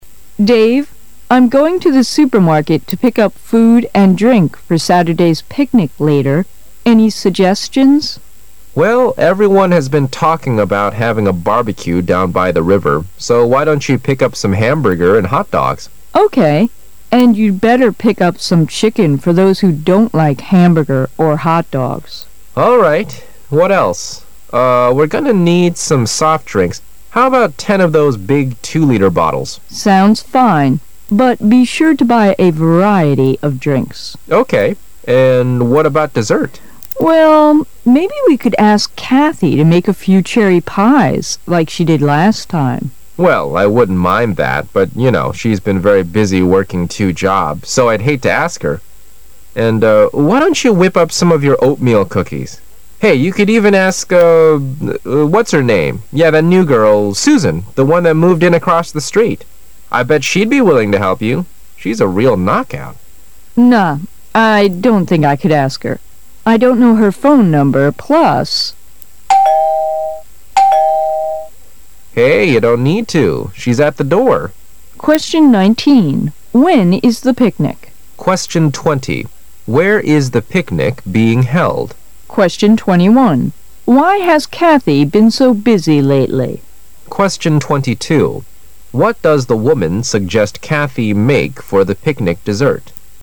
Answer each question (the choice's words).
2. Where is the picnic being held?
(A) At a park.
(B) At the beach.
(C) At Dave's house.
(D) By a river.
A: By a river.

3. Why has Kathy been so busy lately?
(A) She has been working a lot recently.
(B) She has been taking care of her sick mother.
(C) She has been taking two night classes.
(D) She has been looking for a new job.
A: She has been working a lot recently.

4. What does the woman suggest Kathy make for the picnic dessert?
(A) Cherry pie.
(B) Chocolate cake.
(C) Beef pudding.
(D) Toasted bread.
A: Cherry pie.

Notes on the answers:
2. 该题是对"野餐地点"这一具体内容的考查。从Well,everyone has been talking about having a barbecue down by the river可知,野餐地点应是"小河边",因此选择答案D),句中的barbecue表示"吃烤肉食品的野餐会"。
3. 该题答案出现在she's been very busy working two jobs一句中,也就是说"她正忙于做两项工作",选项中最符合此意的只有A)。
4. 该题是对"野餐甜点"这一内容的考查。要做好该题,把握好maybe we could ask Kathy to make a few cherry pies like she did last time.这一句是关键,其中cherry pies是最关键的内容,表示"樱桃馅饼",选项B)、C)、D)分别表示"巧克力蛋糕"、"牛肉布丁"、"烤面包",因此都不符合题意,只有选项A)是正确的。

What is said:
[解析] 19-22 W: Dave. I'm going to the supermarket to pick up food and drink for Saturday's picnic later. Any suggestions? M: Well, everyone has been talking about having a barbecue down by the river, so why don't you pick up some ham burger and hot dogs? W: Okay. And you better pick up some chicken for those who don't like hamburger or hot dogs. What else? Uh, we're gonna need some soft drinks, How about ten of those big 2-liter bottles? W: Sounds fine, but be sure to buy a variety of drinks. M: Okay. And what about dessert? W: Well, maybe we could ask Kathy to make a few cherry pies like she did last time. M: Well, I wouldn't mind that, but you know, she's been very busy working two jobs, so I'd hate to ask her, and uh... why don't you whip up some of your oatmeal cookies? Hey, you could even ask, uh... ,what's her name... yeah that new girl, Susan, the one that moved in across the street! I bet she'd be willing to help you! She's a real knockout ! W: Nah, I don't think I could ask her... I don't know her phone number, plus... [Door bell tings...] M: Hey, you don't need to. She's at the door! When is the picnic?